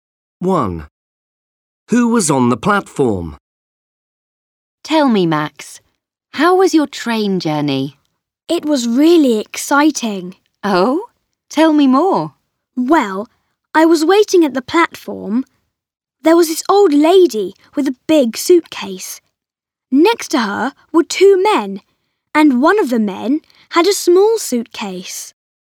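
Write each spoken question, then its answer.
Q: Who was on the platform?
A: An old lady with a big suitcase and two men, one with a small suitcase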